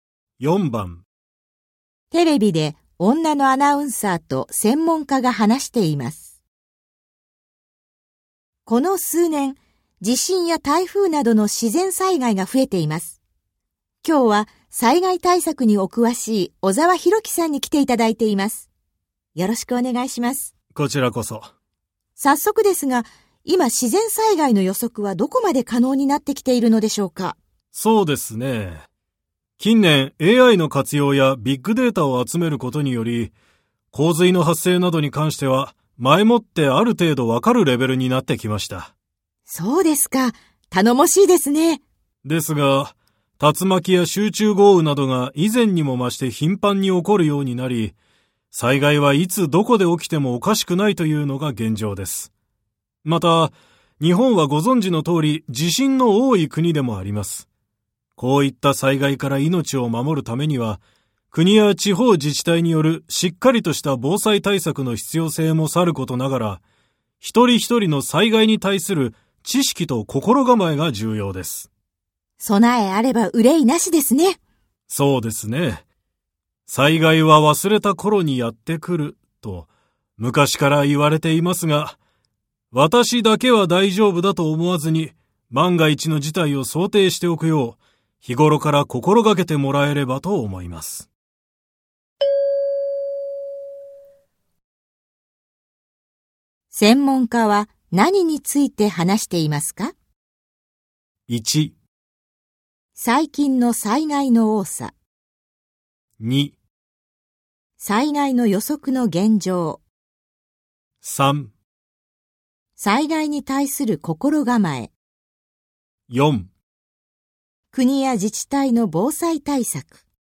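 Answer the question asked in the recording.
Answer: 3: 災害に対する心構え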